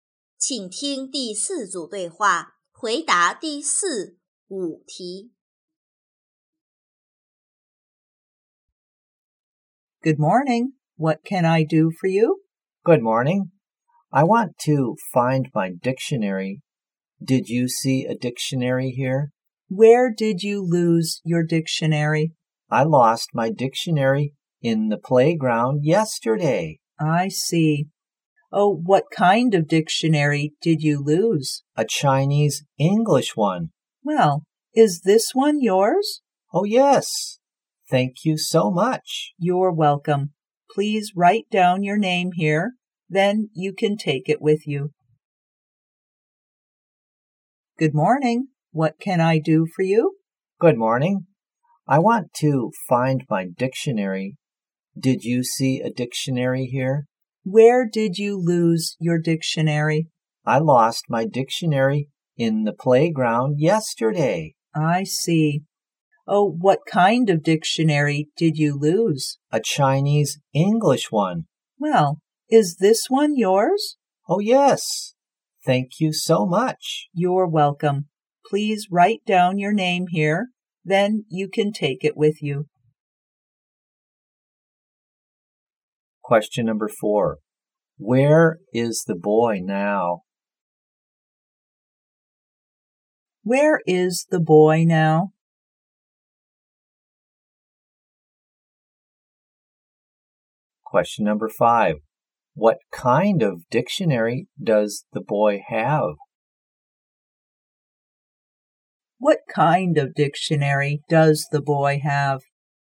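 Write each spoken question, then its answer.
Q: What kind of dictionary does the boy have?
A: A Chinese-English dictionary.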